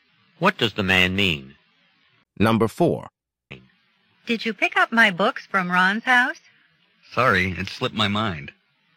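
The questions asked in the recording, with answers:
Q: What does the man mean?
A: He forgot to pick up the books.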